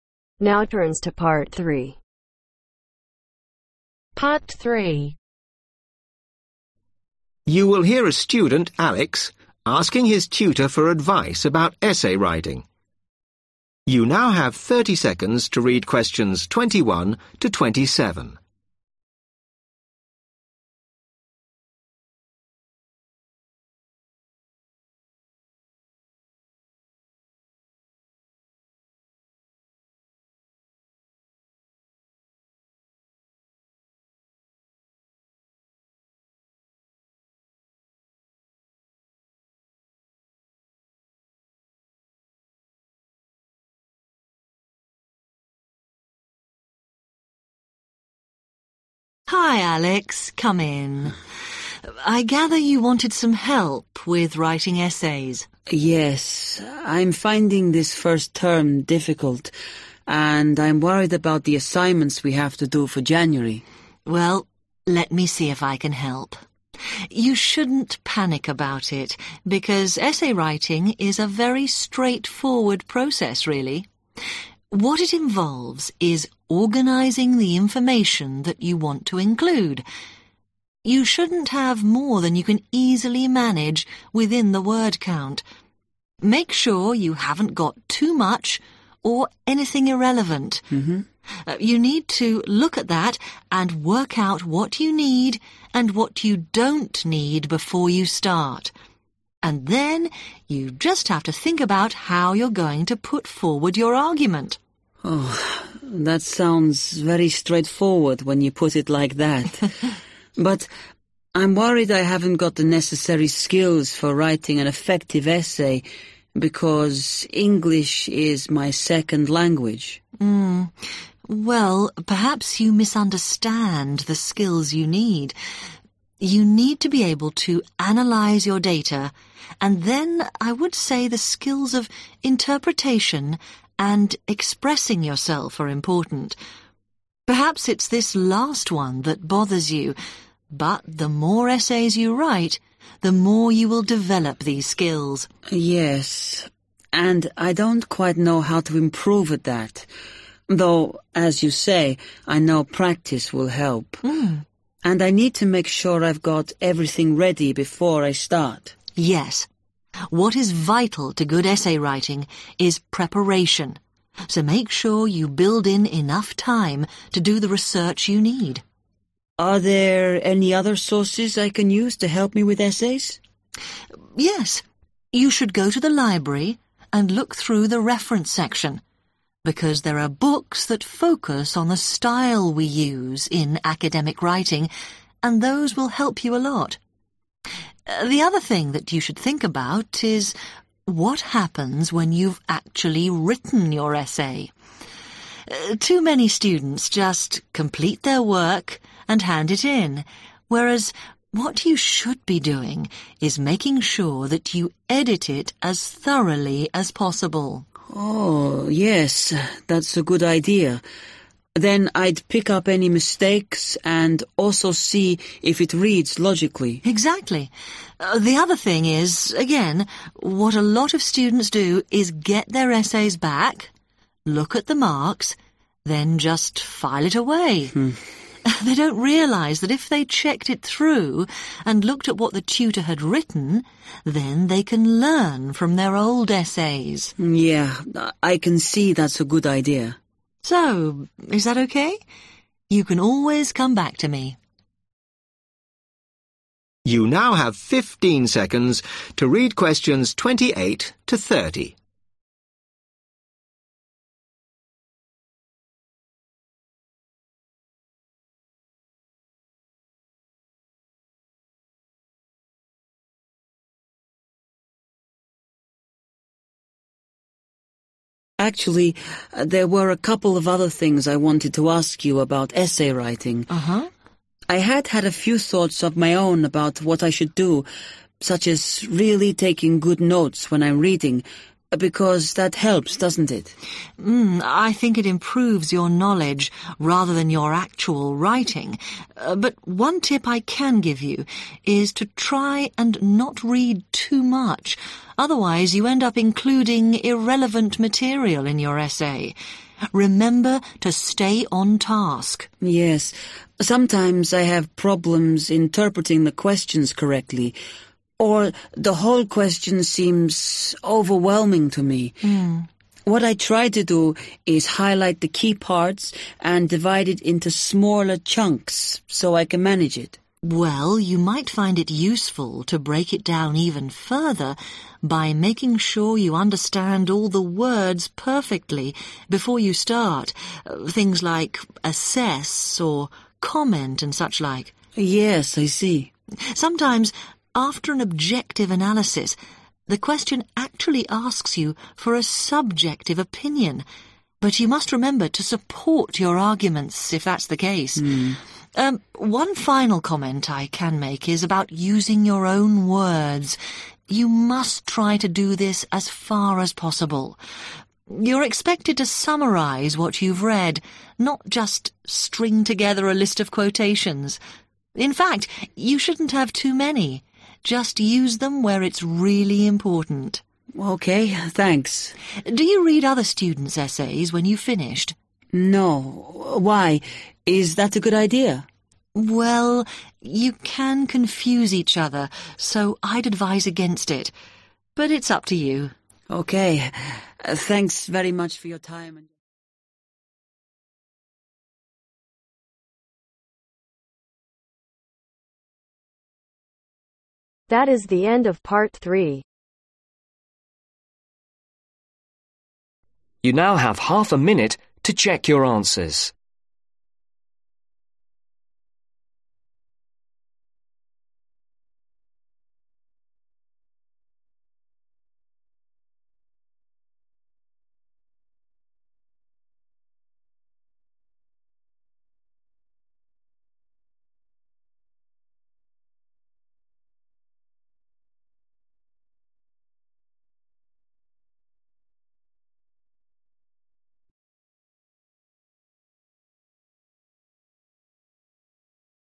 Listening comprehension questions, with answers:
Complete the summary below. Write ONE WORD ONLY for each answer.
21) Essay writing is simply the process of (21)............ information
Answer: Organizing

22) presenting your (22)............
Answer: Argument

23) you will need to use skills of analysis, (23)............ and expression.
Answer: Interpretation

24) The key to producing a good essay is in the (24)............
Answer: Preparation

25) You will find several books in the library to help you with the particular (25)............ of academic writing.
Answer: Style

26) When you have completed your essay you must remember to (26)............ it carefully and take out anything irrelevant.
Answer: Edit

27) you can (27)............ from it.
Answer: Learn